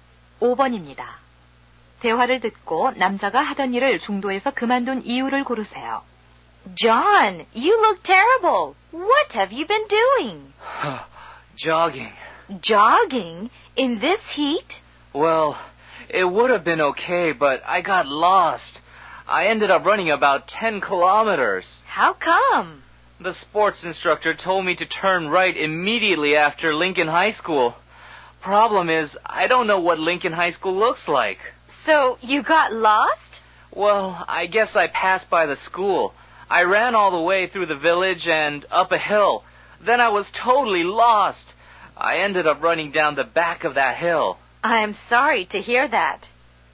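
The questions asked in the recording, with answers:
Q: 대화를 듣고 남자가 하던 일을 중도에서 그만둔 이유를 고르세요.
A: 길을 잃어서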